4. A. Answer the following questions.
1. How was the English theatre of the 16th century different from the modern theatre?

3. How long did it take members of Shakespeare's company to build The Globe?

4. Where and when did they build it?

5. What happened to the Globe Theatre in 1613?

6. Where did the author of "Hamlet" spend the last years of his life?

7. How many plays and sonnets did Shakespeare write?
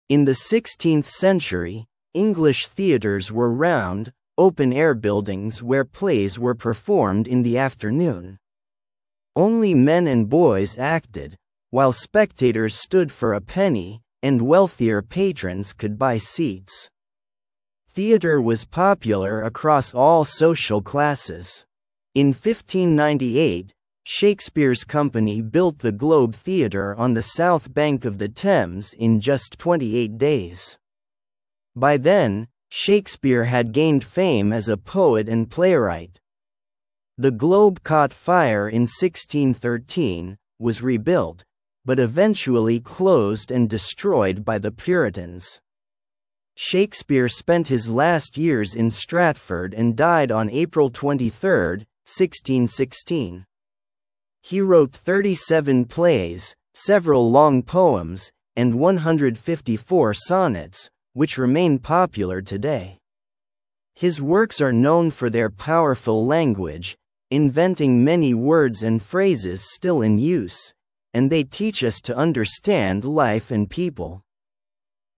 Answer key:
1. The actors were only men and boys, the performances were in the middle of the day because of the light. The audience had to stand to watch a play.
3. It took 28 days for members of Shakespeare's company to build The Globe.
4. The Globe Theatre was built on the southern bank of the Thames River in 1598.
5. In 1613 during a performance The Globe caught fire.
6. The author of "Hamlet" spent the last years of his life in Stratford.
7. Shakespeare wrote 37 plays and 154 sonnets.

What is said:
In the 16th century, English theatres were round, open-air buildings where plays were performed in the afternoon. Only men and boys acted, while spectators stood for a penny, and wealthier patrons could buy seats. Theatre was popular across all social classes. In 1598, Shakespeare's company built the Globe Theatre on the south bank of the Thames in just 28 days. By then, Shakespeare had gained fame as a poet and playwright. The Globe caught fire in 1613, was rebuilt, but eventually closed and destroyed by the Puritans. Shakespeare spent his last years in Stratford and died on April 23, 1616. He wrote 37 plays, several long poems, and 154 sonnets, which remain popular today. His works are known for their powerful language, inventing many words and phrases still in use, and they teach us to understand life and people.

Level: 8 класс